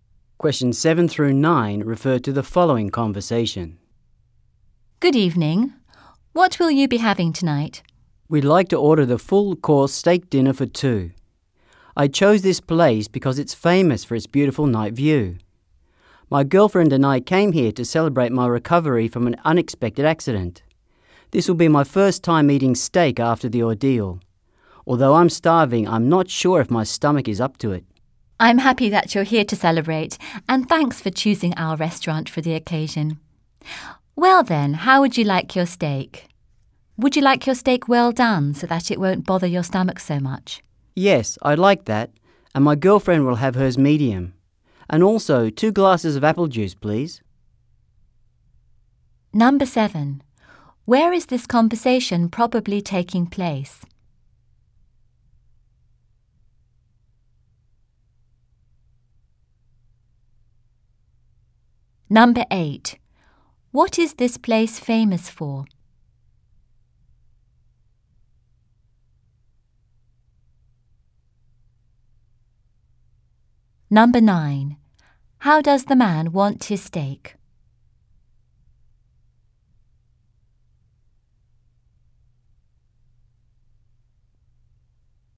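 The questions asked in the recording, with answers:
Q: Where is this conversation probably taking place?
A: At a restaurant

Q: What is this place famous for?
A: Its beautiful night view

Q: How does the man want his steak?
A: Well done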